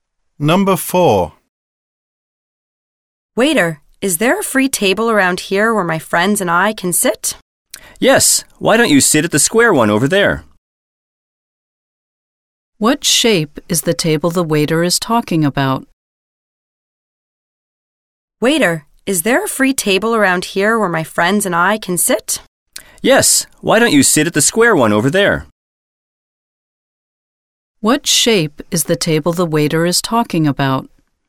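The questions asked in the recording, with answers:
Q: What shape is the table the waiter is talking about?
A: Square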